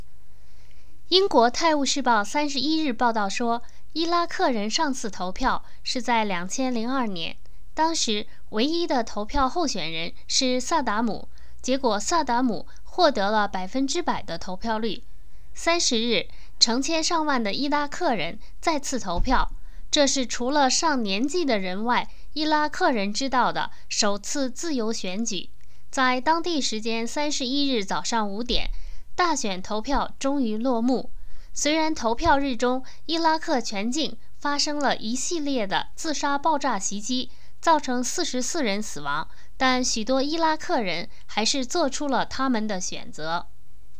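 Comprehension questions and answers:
Please answer the following questions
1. 伊拉克选举是在何时开始的?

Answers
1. 30日

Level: 3rd Year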